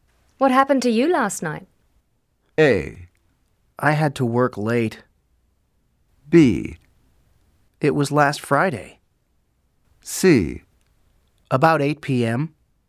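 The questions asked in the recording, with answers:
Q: What happened to you last night?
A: A: I had to work late.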